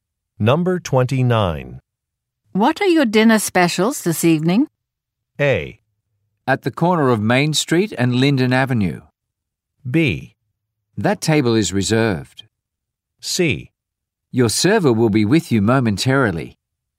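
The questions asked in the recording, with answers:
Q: What are your dinner specials this evening?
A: C: Your server will be with you momentarily.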